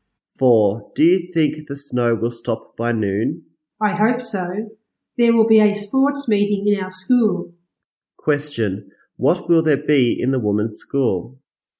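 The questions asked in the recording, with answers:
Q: What will there be in the woman's school?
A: A sports meeting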